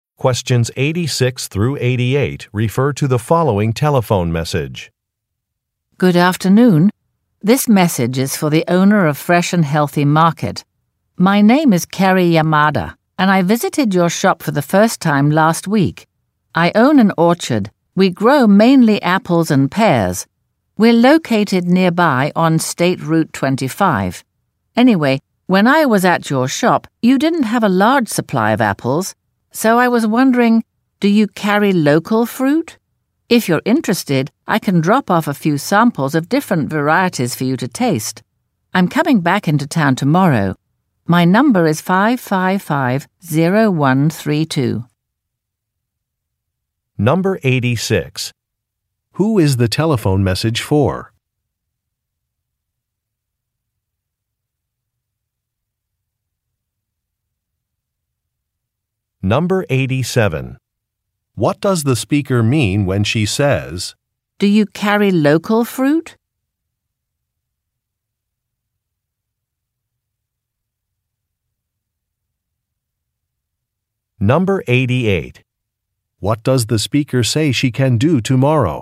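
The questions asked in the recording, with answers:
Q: Who is the telephone message for?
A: The owner of Fresh and Healthy Market

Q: What does the speaker say she can do tomorrow?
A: Drop off fruit samples for tasting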